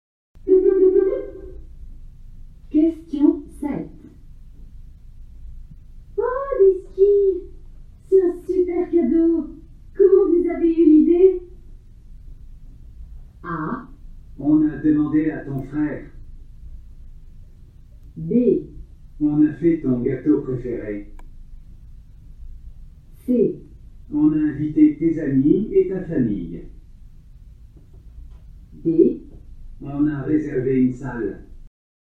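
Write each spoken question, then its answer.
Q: Comment vous avez eu l'idée?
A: A: On a demandé à ton frère.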